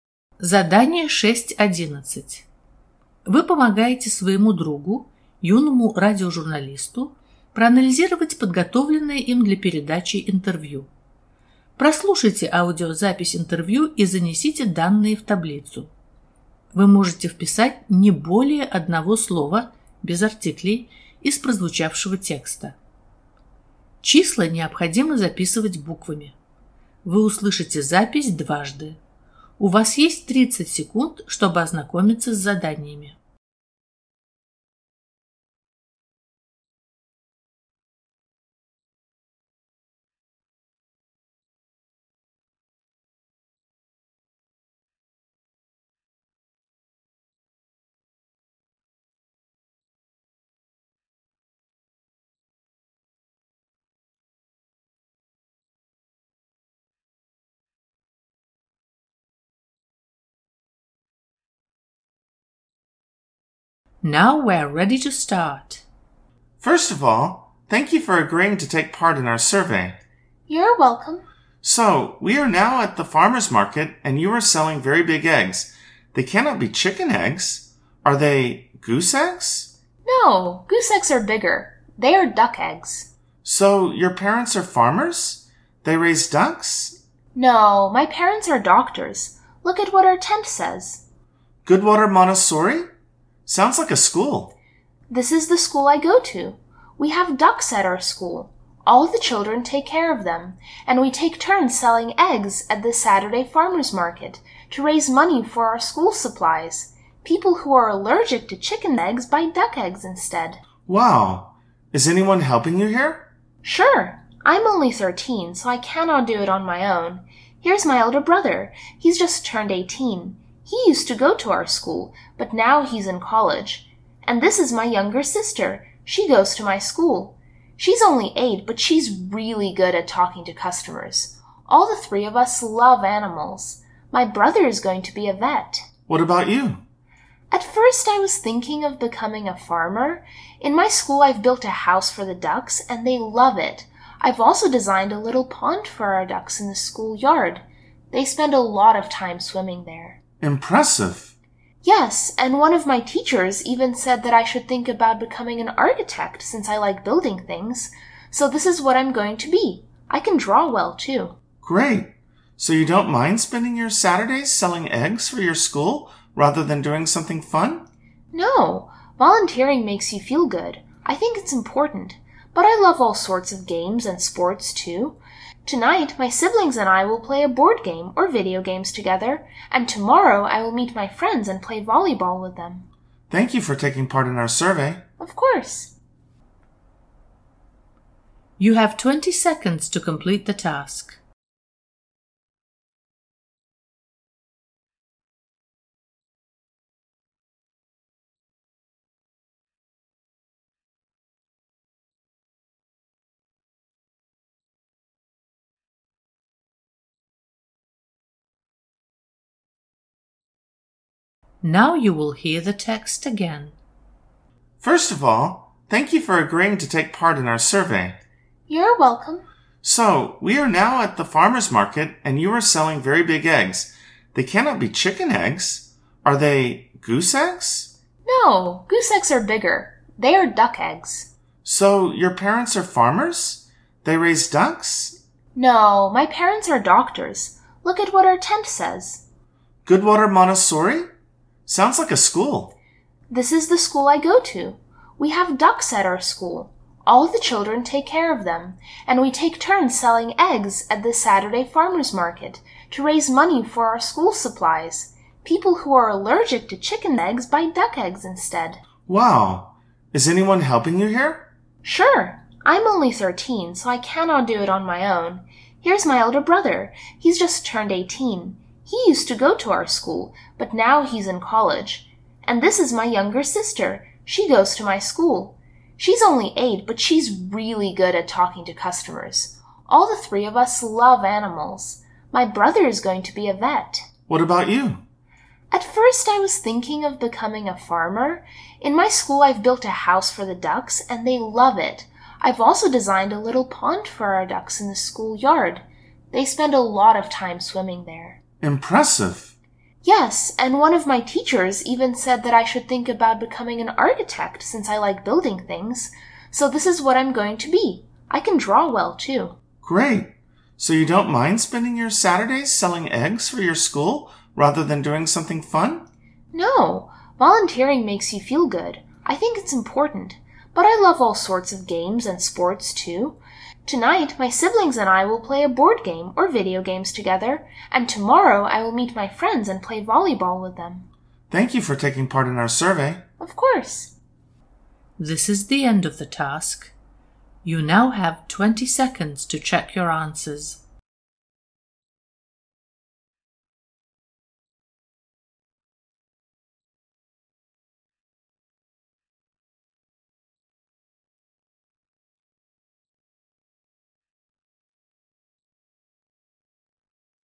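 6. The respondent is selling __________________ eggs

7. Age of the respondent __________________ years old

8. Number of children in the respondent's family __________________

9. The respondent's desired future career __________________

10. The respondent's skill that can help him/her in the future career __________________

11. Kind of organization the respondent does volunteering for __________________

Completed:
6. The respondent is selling duck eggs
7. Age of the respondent thirteen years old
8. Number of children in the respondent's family three
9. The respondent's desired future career architect
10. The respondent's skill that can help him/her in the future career drawing
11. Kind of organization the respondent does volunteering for school

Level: ОГЭ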